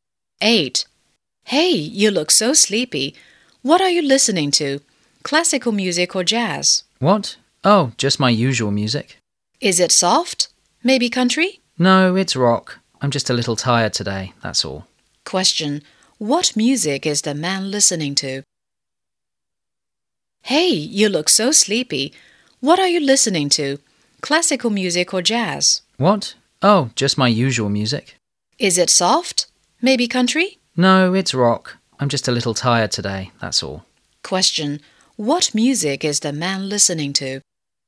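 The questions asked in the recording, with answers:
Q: What music is the man listening to?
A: Rock music.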